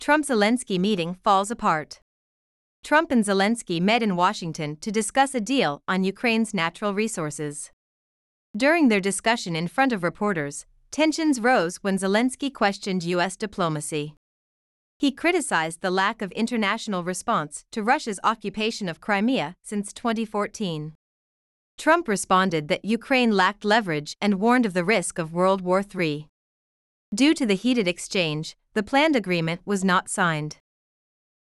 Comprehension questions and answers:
次の各質問の答えを探しながら聞きましょう。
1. Why did Trump and Zelenskyy meet in Washington?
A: They met to discuss a deal on Ukraine's natural resources.

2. When did tensions rise during their discussion?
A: Tensions rose when Zelenskyy questioned US diplomacy.

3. How did Trump respond?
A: He responded that Ukraine lacked leverage and warned of the risk of World War Three.

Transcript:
Trump-Zelensky Meeting Falls Apart
Trump and Zelenskyy met in Washington to discuss a deal on Ukraine's natural resources.
During their discussion in front of reporters, tensions rose when Zelenskyy questioned US diplomacy.
He criticized the lack of international response to Russia's occupation of Crimea since 2014.
Trump responded that Ukraine lacked leverage and warned of the risk of World War Three.
Due to the heated exchange, the planned agreement was not signed.

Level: 中級脱出